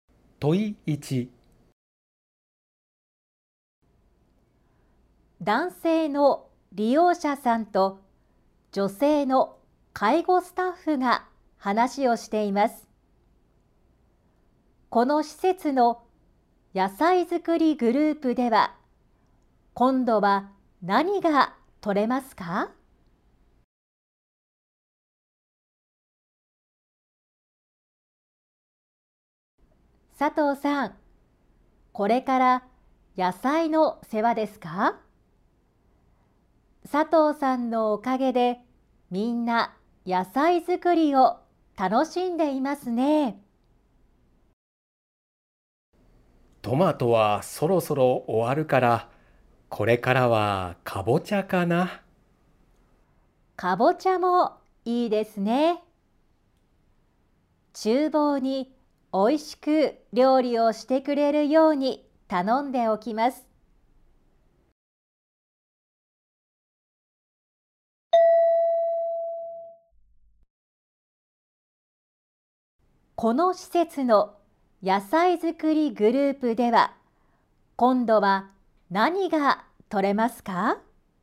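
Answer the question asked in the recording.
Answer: かぼちゃ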